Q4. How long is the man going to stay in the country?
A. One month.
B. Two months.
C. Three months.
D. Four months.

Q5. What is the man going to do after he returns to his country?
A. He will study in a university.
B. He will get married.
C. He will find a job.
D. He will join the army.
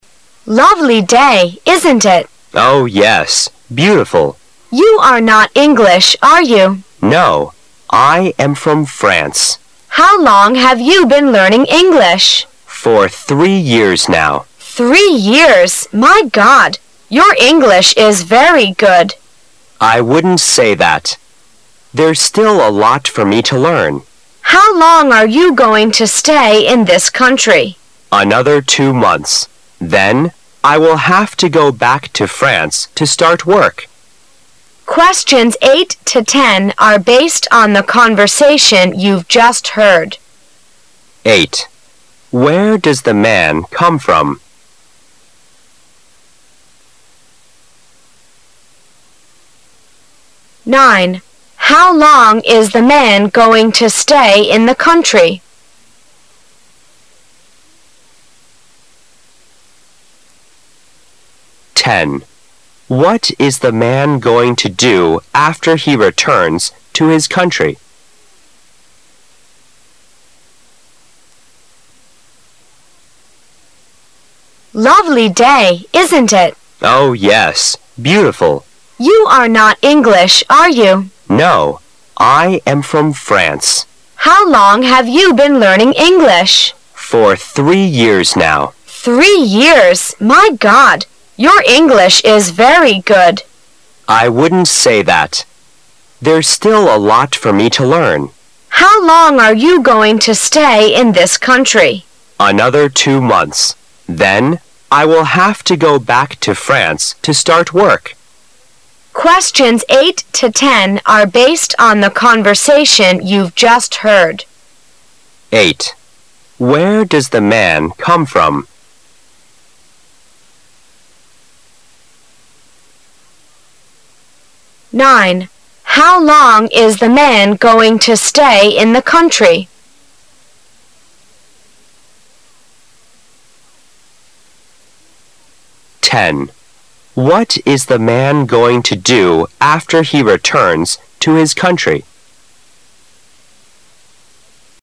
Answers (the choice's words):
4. Two months.
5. He will find a job.

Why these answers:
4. 这个题目要注意的足对话中两次提到了How long, 一次是问他学英语有多长时间了,另一个是How long are you going to stay in this country?听录音时仔细区分,则本题不难回答。
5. 刚才提到了还要在这里呆两个月,然后又说到了下一步的打算,I will have to go back to France to start work,所以答案应该是C)。